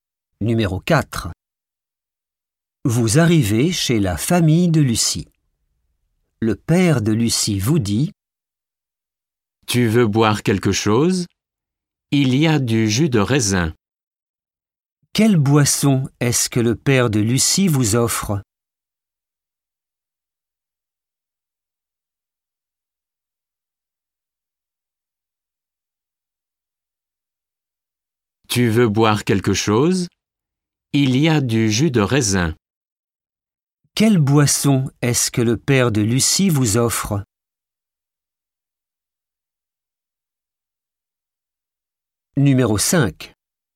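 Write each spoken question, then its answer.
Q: Quelle boisson est-ce que le père de Lucie vous offre?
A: Du jus de raisin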